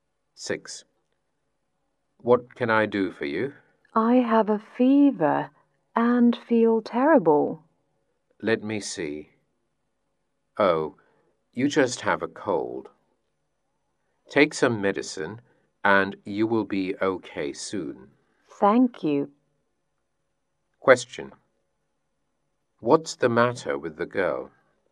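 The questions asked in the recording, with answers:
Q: What's the matter with the girl?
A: She has a cold.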